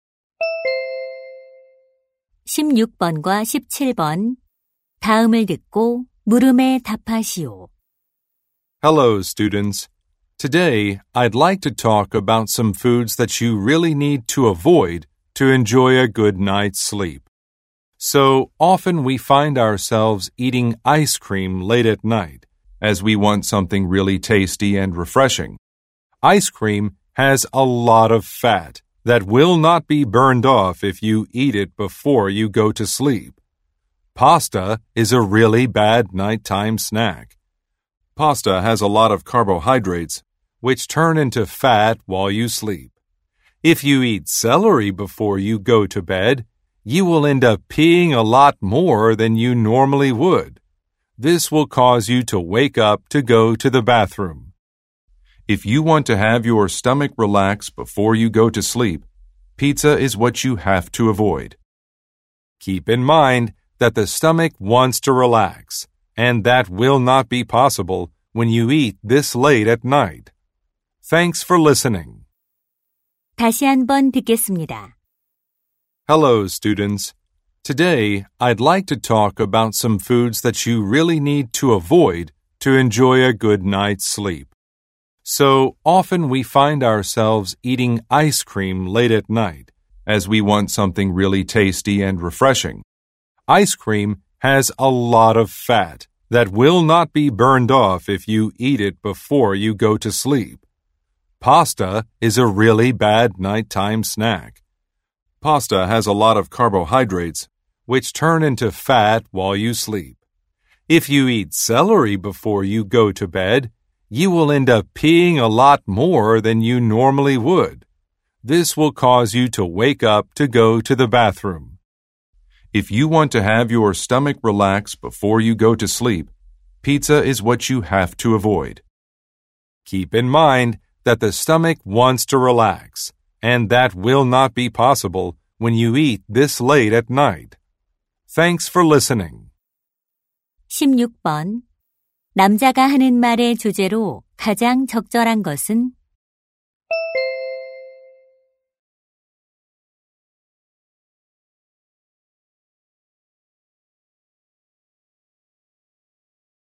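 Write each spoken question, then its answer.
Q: 남자가 하는 말의 주제로 가장 적절한 것은?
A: 숙면을 위해 자기 전에 피해야 할 음식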